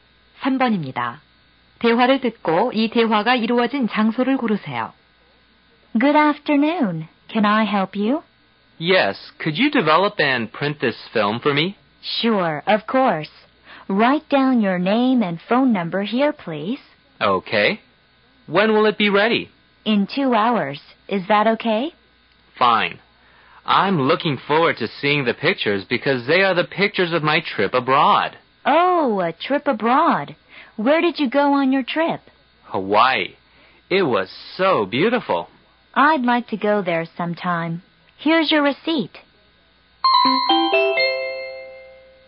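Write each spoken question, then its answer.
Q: 대화를 듣고 이 대화가 이루어진 장소를 고르세요.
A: 사진관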